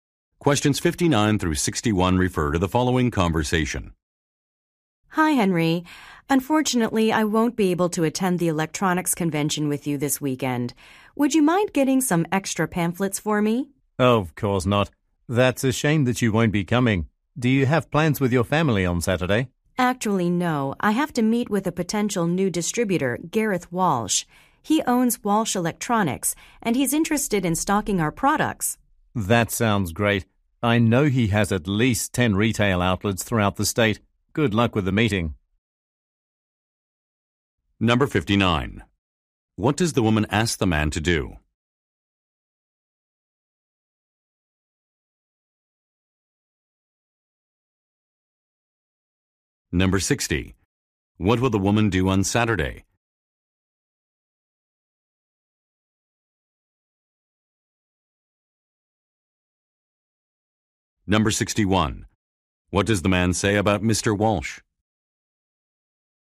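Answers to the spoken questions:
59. Get extra pamphlets for her
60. Meet a potential new distributor
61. He has at least 10 retail outlets in the state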